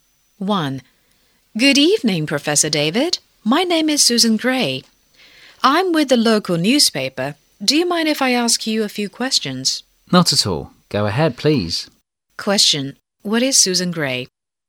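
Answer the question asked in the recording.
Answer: A reporter for the local newspaper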